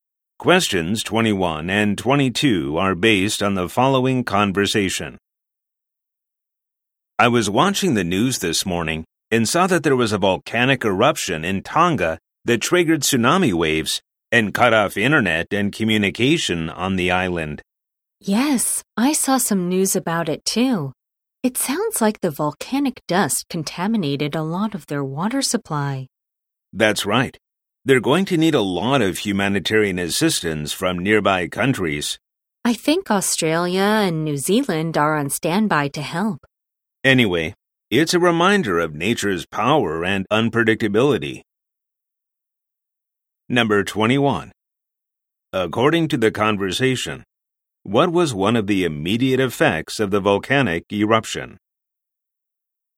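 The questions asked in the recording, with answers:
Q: According to the conversation, what was one of the immediate effects of the volcanic eruption?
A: Tsunami waves and cut-off internet and communication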